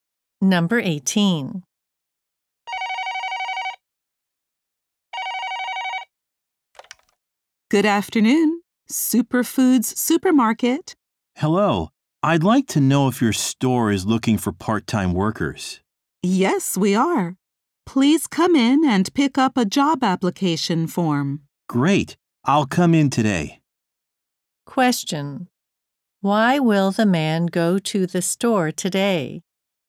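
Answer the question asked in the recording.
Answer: To pick up a job application form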